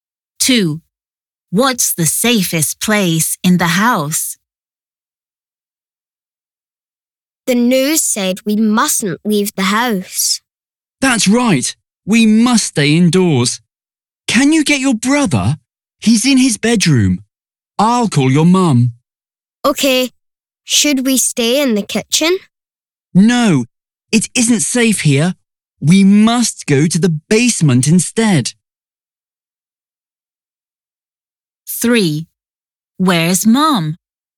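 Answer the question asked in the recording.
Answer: the basement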